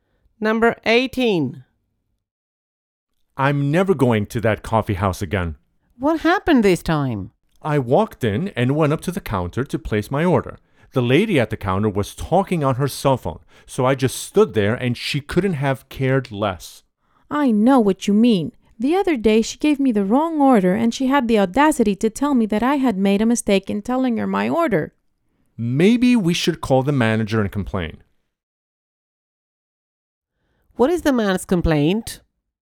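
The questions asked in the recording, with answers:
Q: What is the man's complaint?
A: The counter staff ignored him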